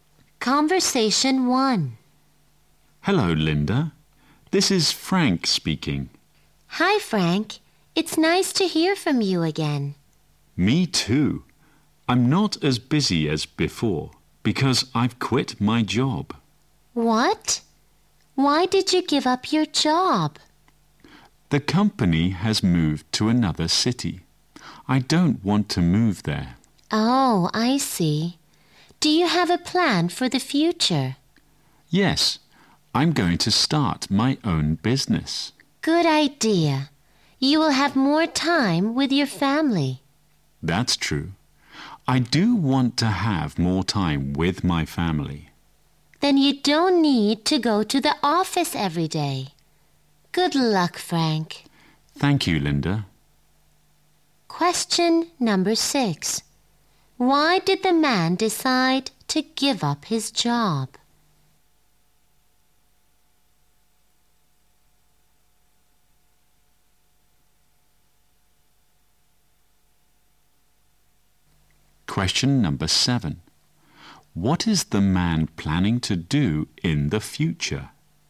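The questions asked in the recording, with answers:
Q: Why did the man decide to give up his job?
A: The company moved to another city and he didn't want to move

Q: What is the man planning to do in the future?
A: Start his own business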